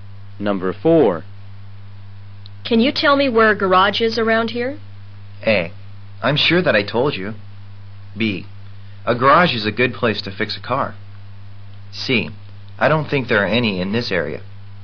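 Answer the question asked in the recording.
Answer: C: I don't think there are any in this area.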